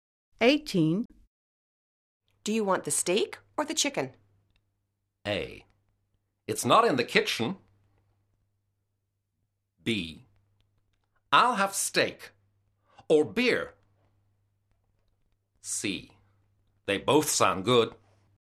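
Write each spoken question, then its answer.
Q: Do you want the steak or the chicken?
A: B: I'll have steak.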